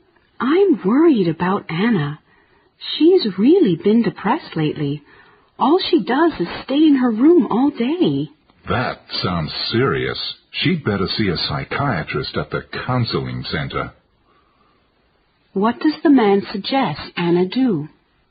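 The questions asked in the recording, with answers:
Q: What does the man suggest Anna do?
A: See a psychiatrist at the counseling center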